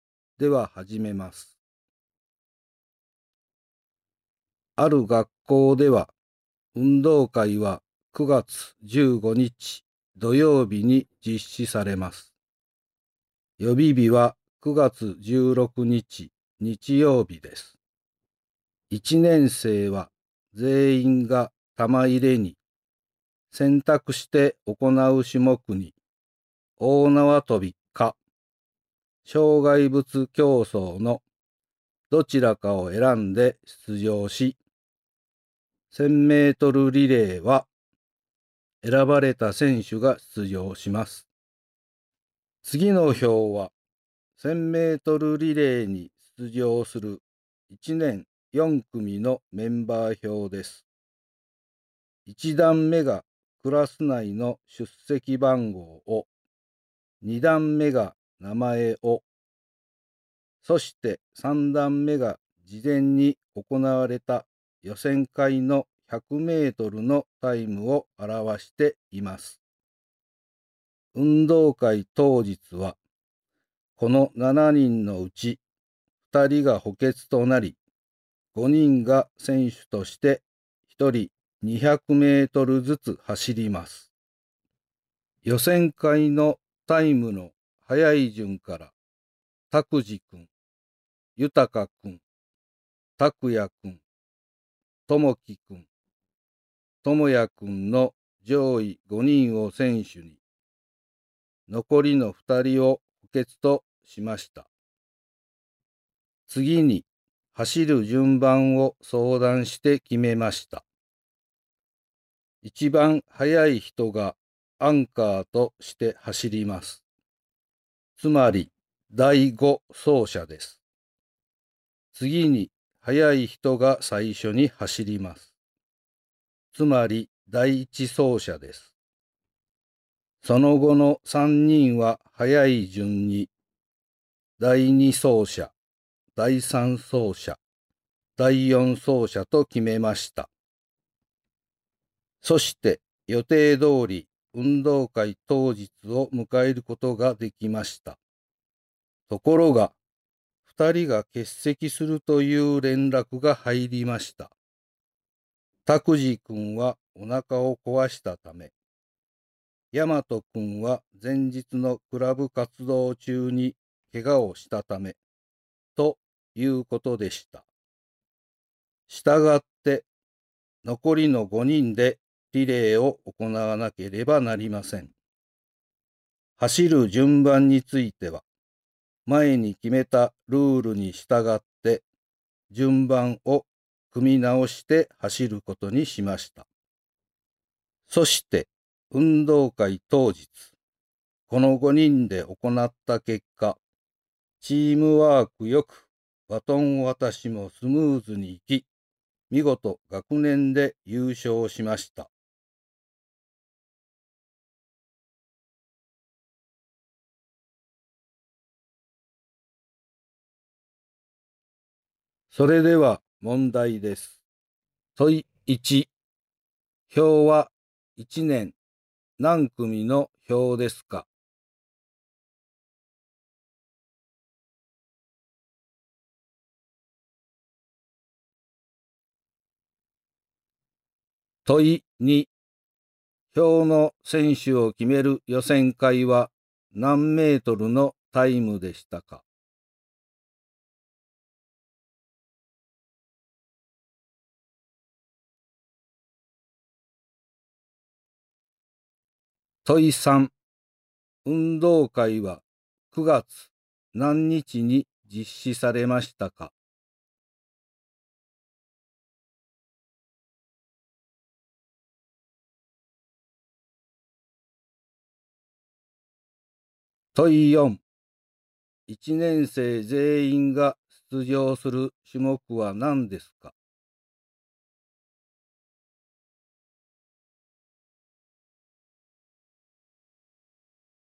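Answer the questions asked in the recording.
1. 1年4組
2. 100メートル
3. 9月15日
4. 玉入れ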